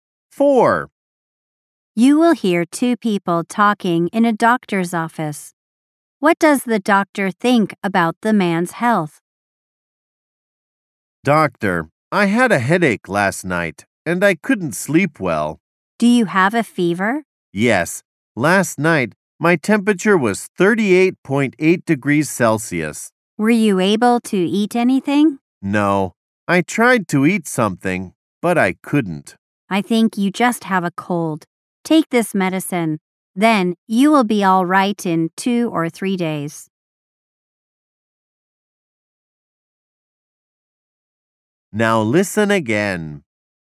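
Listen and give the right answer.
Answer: He just has a cold and will be all right in 2 or 3 days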